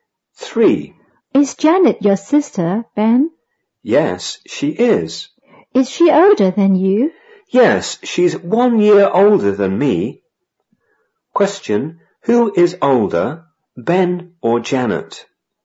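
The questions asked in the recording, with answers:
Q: Question, who is older, Ben or Janet?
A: Janet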